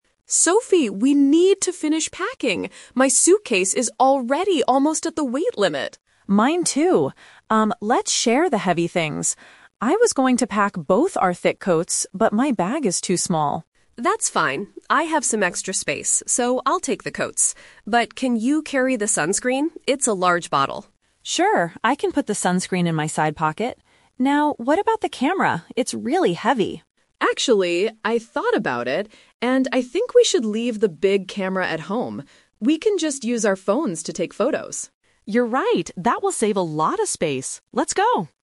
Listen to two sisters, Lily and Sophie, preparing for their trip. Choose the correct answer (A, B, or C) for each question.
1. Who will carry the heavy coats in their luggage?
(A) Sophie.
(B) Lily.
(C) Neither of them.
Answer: (B) Lily.

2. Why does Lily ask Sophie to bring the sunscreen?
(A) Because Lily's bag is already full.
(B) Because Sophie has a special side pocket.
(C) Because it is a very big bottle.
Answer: (C) Because it is a very big bottle.

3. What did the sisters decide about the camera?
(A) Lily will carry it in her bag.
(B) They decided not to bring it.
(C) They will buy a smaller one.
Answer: (B) They decided not to bring it.

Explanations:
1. This is the "Twist". Sophie initially says she was going to pack the coats, but then Lily says, "I'll take the coats" because she has extra space. Option (A) is the trap (the first person mentioned).
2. Lily says, "Can you carry the sunscreen? It's a large bottle." Option (C) uses "very big" as a synonym for "large". Option (B) is a detail mentioned by Sophie later, but it's not the reason Lily asked.
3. Lily suggests they should "leave the big camera at home" and Sophie agrees. Option (A) is a trap based on Lily being the one who suggested it. Option (C) is not mentioned.

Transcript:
Lily: Sophie, we need to finish packing! My suitcase is already almost at the weight limit.
Sophie: Mine too. Um, let's share the heavy things. I was going to pack both our thick coats, but my bag is too small.
Lily: That's fine. I have some extra space, so I'll take the coats. But can you carry the sunscreen? It's a large bottle.
Sophie: Sure, I can put the sunscreen in my side pocket. Now, what about the camera? It's really heavy.
Lily: Actually, I thought about it, and I think we should leave the big camera at home. We can just use our phones to take photos.

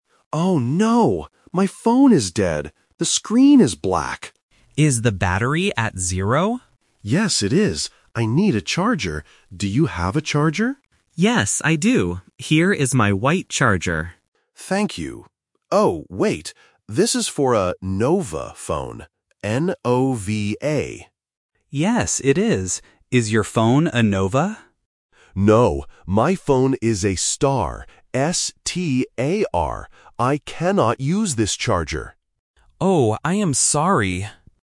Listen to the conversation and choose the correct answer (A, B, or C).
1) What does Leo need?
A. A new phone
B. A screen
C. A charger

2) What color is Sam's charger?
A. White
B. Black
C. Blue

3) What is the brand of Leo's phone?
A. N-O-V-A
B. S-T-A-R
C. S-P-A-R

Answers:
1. C. A charger
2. A. White
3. B. S-T-A-R

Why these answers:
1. The correct answer is C. Leo explicitly says, "I need a charger." Option A (A new phone) is a trap because they are talking about phones, but he just needs to charge his old one. Option B (A screen) is the trap because Leo says "The screen is black," but he doesn't need a new screen.
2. The correct answer is A. Sam says, "Here is my white charger." Option B (Black) is the trap because Leo mentions that his screen is "black", which tests if the listener can connect the correct color to the correct object. Option C (Blue) is not mentioned.
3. The correct answer is B. Leo clearly spells the brand of his phone: "S-T-A-R". Option A (N-O-V-A) is the trap because it is the brand of Sam's charger, not Leo's phone. Option C (S-P-A-R) is a trap because the letters "T" and "P" can sometimes sound similar.

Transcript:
Leo: Oh no! My phone is dead. The screen is black.
Sam: Is the battery at zero?
Leo: Yes, it is. I need a charger. Do you have a charger?
Sam: Yes, I do. Here is my white charger.
Leo: Thank you. Oh, wait. This is for a "Nova" phone. N-O-V-A.
Sam: Yes, it is. Is your phone a Nova?
Leo: No, my phone is a "Star". S-T-A-R. I cannot use this charger.
Sam: Oh, I am sorry.

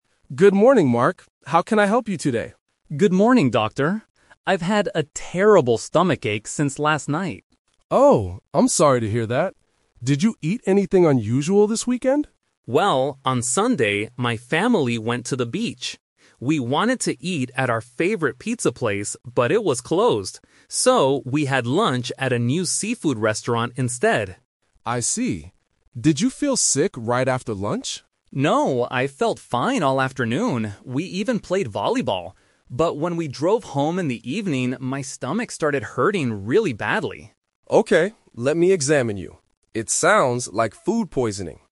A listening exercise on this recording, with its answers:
Listen to the conversation between a doctor and a patient. Then, circle the correct answer for each question.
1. What did Mark eat for lunch on Sunday?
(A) Pizza.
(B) Seafood.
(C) Chicken.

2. What did Mark do in the afternoon?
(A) He drove home.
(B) He went to the hospital.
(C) He played volleyball.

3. When did Mark's stomachache start?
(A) Right after lunch.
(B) In the evening.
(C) On Monday morning.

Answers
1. (B) Seafood.
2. (C) He played volleyball.
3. (B) In the evening.

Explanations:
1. Mark says, "So, we had lunch at a new seafood restaurant instead." Option (A) is the trap (The Twist); he wanted to eat pizza, but the place was closed. Option (C) is a plausible food, but it is never mentioned.
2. Mark states clearly, "No, I felt fine all afternoon. We even played volleyball." Option (A) is the trap; he drove home, but that was in the evening, not the afternoon. Option (B) is incorrect because he is at the doctor's office now (Monday), not during Sunday afternoon.
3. Mark explains, "But when we drove home in the evening, my stomach started hurting really badly." Option (A) is the trap; the doctor asks if he felt sick right after lunch, but Mark answers "No." Option (C) is when he goes to the doctor, not when the pain started.

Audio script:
Dr. Smith: Good morning, Mark. How can I help you today?
Mark: Good morning, Doctor. I've had a terrible stomachache since last night.
Smith: Oh, I'm sorry to hear that. Did you eat anything unusual this weekend?
Mark: Well, on Sunday, my family went to the beach. We wanted to eat at our favorite pizza place, but it was closed. So, we had lunch at a new seafood restaurant instead.
Dr. Smith: I see. Did you feel sick right after lunch?
Mark: No, I felt fine all afternoon. We even played volleyball. But when we drove home in the evening, my stomach started hurting really badly.

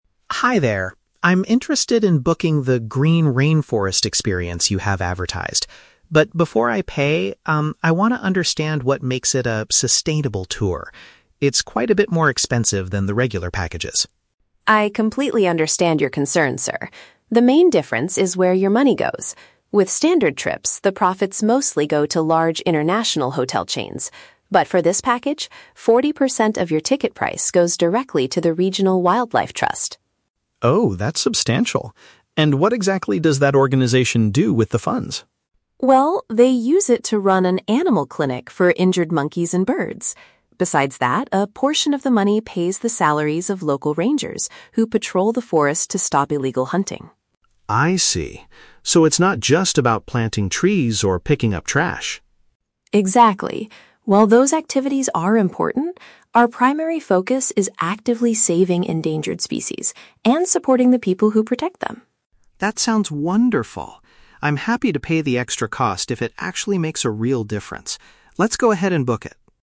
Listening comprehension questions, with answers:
Listen to a conversation between a tourist and a travel agent. Choose the correct answer (A, B, or C) for each question.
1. Why is David asking questions before he buys the ticket?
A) He hopes to get a discount on the expensive package.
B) He wants to know how the tour benefits the environment.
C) He wants to change his booking from a standard trip to a green one.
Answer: B) He wants to know how the tour benefits the environment.

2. According to Lisa, how is the money from this specific tour used?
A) It is given to large international hotel businesses.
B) It is used to organize events for picking up rubbish.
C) It helps pay the workers who guard the jungle area.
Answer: C) It helps pay the workers who guard the jungle area.

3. How does David feel at the end of the conversation?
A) He is willing to spend more money for a good cause.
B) He is confused about the activities included in the tour.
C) He is disappointed that the trip does not involve planting trees.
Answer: A) He is willing to spend more money for a good cause.

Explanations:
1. David says he wants to understand "what makes it a sustainable tour" and asks what the organization does with the funds. This is paraphrased as "know how the tour benefits the environment".
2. Lisa explains that a portion of the money pays the salaries of "local rangers who patrol the forest". "Local rangers" is paraphrased as "workers who guard", and "forest" is paraphrased as "jungle area".
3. At the end, David says he is "happy to pay the extra cost if it actually makes a real difference". "Happy to pay the extra cost" is paraphrased as "willing to spend more money".

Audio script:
David: Hi there. I'm interested in booking the "Green Rainforest Experience" you have advertised. But before I pay, um, I want to understand what makes it a "sustainable tour." It's quite a bit more expensive than the regular packages.
Lisa: I completely understand your concern, sir. The main difference is where your money goes. With standard trips, the profits mostly go to large international hotel chains. But for this package, forty percent of your ticket price goes directly to the Regional Wildlife Trust.
David: Oh, that's substantial. And what exactly does that organization do with the funds?
Lisa: Well, they use it to run an animal clinic for injured monkeys and birds. Besides that, a portion of the money pays the salaries of local rangers who patrol the forest to stop illegal hunting.
David: I see. So it's not just about planting trees or picking up trash?
Lisa: Exactly. While those activities are important, our primary focus is actively saving endangered species and supporting the people who protect them.
David: That sounds wonderful. I'm happy to pay the extra cost if it actually makes a real difference. Let's go ahead and book it.

